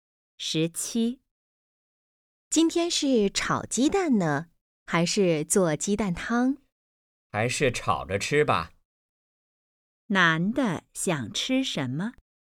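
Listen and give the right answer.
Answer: 炒鸡蛋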